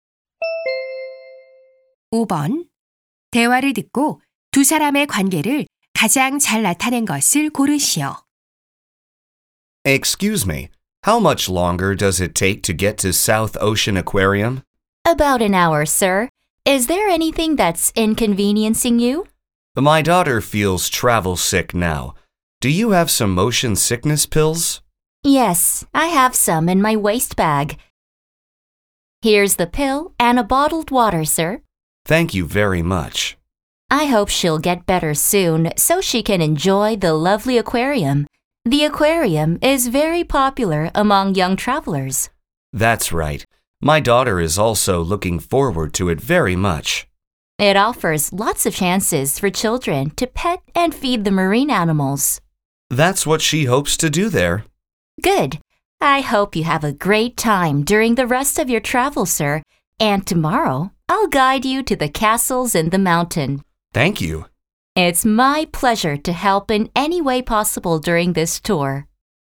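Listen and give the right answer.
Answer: 여행 가이드 - 관광객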